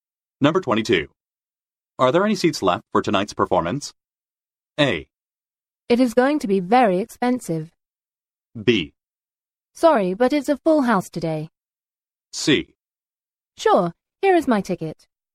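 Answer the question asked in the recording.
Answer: B: Sorry, but it's a full house today.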